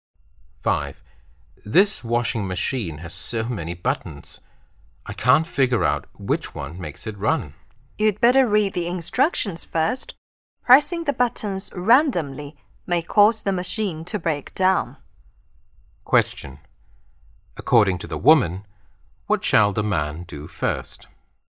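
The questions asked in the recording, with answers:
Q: According to the woman, what shall the man do first?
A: Read the instructions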